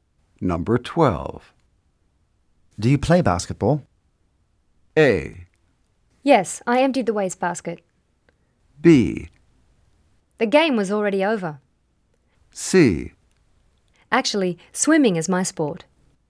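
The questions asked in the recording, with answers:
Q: Do you play basketball?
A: C: Actually, swimming is my sport.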